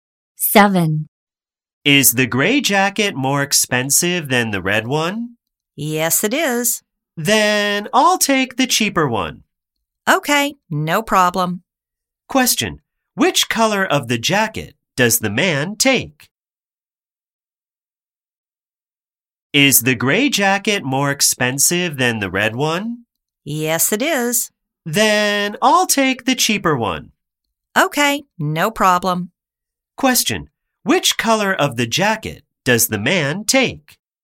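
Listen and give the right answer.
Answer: The red one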